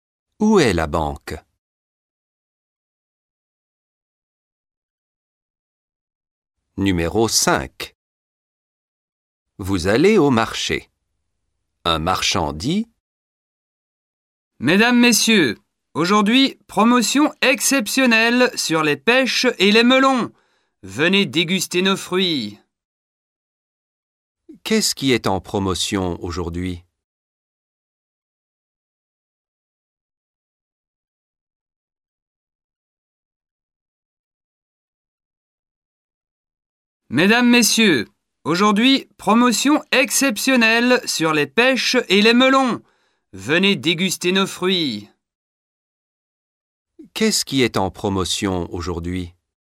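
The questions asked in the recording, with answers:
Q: Qu'est-ce qui est en promotion aujourd'hui?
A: Les pêches et les melons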